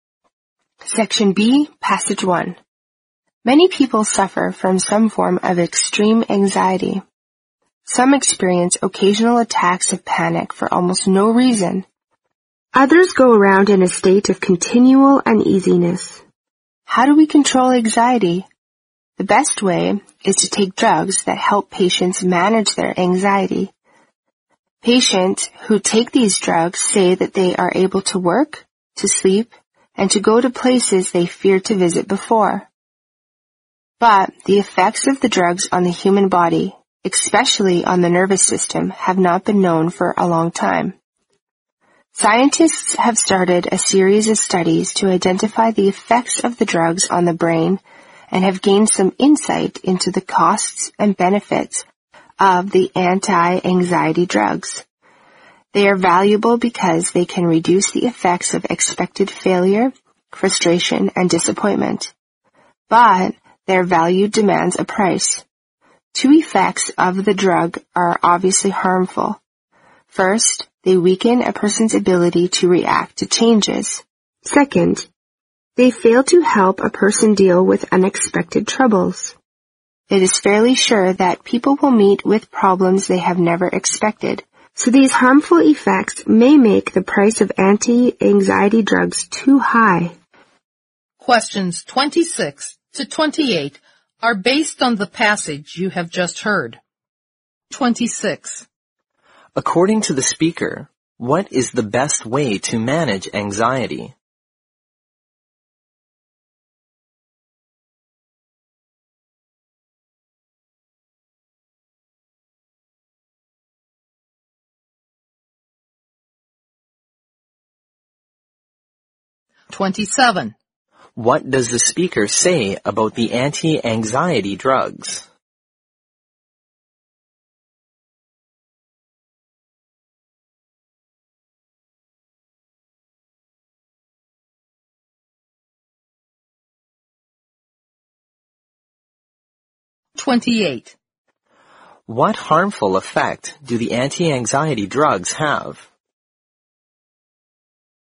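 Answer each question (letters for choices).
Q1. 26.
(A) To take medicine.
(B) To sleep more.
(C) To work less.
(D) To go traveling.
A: A

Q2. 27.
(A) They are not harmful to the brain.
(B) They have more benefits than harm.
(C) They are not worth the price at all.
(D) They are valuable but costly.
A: D

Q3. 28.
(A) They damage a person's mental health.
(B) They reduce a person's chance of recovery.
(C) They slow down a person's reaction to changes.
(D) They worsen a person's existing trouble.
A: C

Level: 新编四级听力练习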